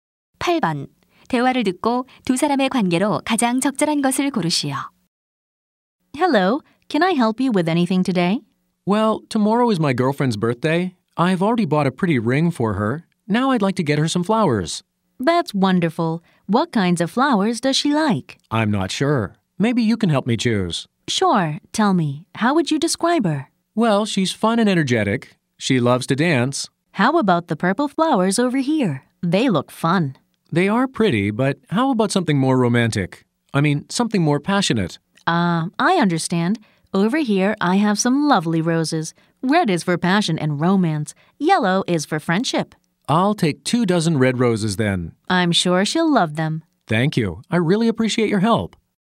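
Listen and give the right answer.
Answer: 꽃집 점원과 손님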